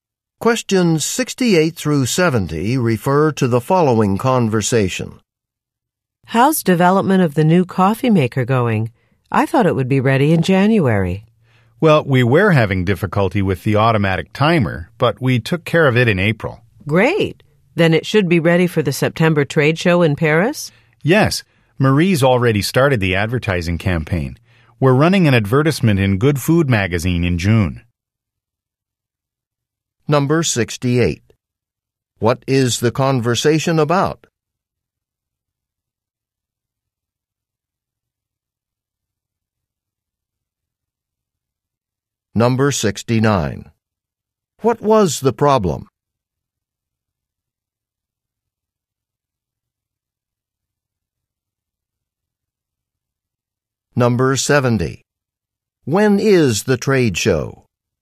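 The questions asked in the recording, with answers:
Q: What is the conversation about?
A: Developing a new coffee maker

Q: What was the problem?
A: The automatic timer

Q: When is the trade show?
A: In September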